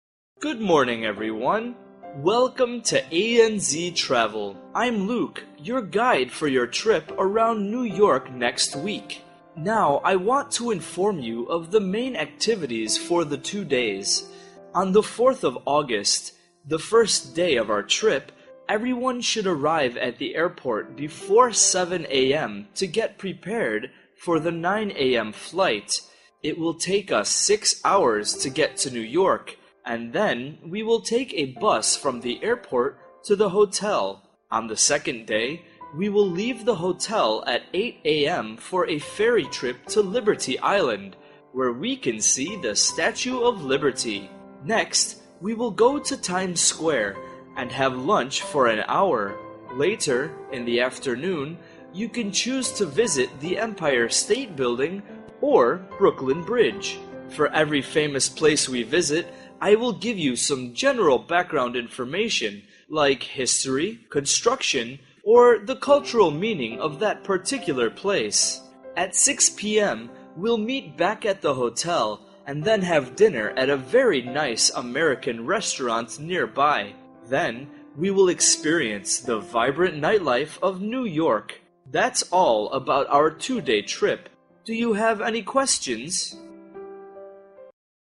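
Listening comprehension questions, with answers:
Task: Answer the questions.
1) What time should travelers arrive at the airport?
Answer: Before 7 a.m.

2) Which place will they visit first on the second day?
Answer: Liberty Island

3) What can tourists choose to visit in the afternoon?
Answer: The Empire State Building or Brooklyn Bridge

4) What time will they have dinner?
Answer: After meeting back at the hotel at 6 p.m.

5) What kind of nightlife will they experience?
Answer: The vibrant nightlife of New York

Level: lớp 8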